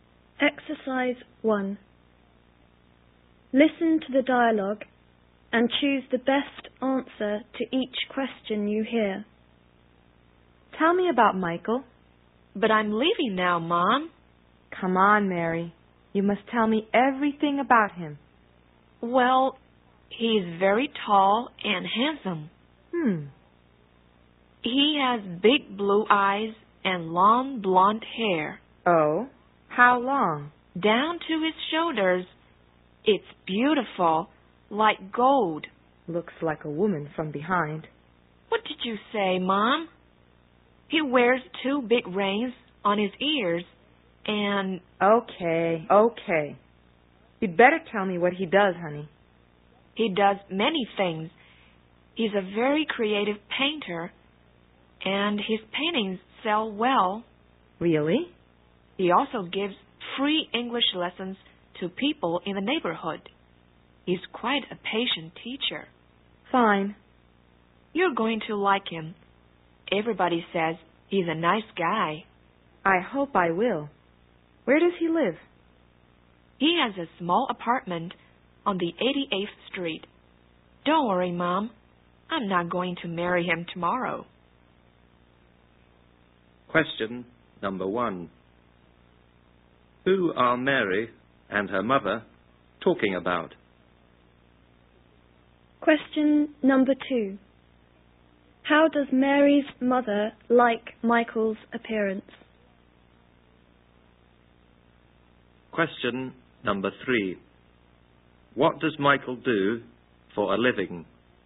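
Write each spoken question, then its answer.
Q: Who are Mary and her mother talking about?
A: Michael, Mary's boyfriend

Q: What does Michael do for a living?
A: He is a painter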